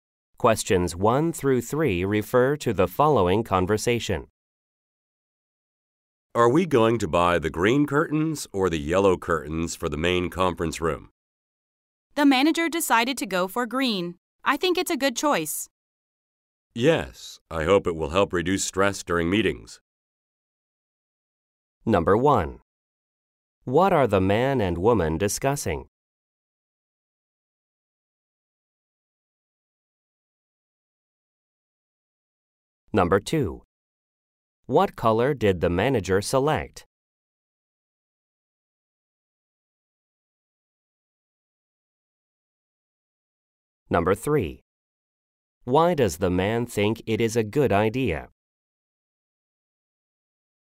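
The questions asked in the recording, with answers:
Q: What are the man and woman discussing?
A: Curtains for the main conference room

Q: What color did the manager select?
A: Green

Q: Why does the man think it is a good idea?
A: It may help reduce stress during meetings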